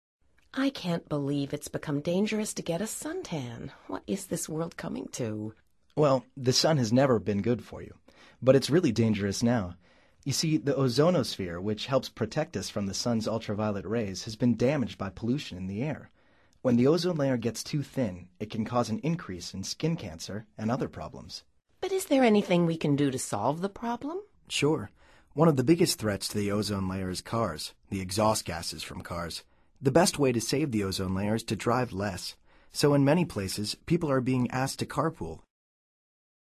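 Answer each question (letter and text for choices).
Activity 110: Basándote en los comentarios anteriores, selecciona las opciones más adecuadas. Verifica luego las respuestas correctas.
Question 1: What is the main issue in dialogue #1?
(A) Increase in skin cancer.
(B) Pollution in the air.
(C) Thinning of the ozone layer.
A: (C) Thinning of the ozone layer.

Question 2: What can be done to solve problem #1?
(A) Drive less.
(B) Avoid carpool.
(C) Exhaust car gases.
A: (A) Drive less.

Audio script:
I can't believe it's become dangerous to get a suntan. What is this world coming to?
Well, the sun has never been good for you, but it's really dangerous now. You see, the ozonosphere, which helps protect us from the sun's ultraviolet rays, has been damaged by pollution in the air. When the ozone layer gets too thin, it can cause an increase in skin cancer and other problems.
But is there anything we can do to solve the problem?
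Sure. One of the biggest threats to the ozone layer is cars – the exhaust gases from cars. The best way to save the ozone layer is to drive less. So in many places, people are being asked to carpool.

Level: Nivel Avanzado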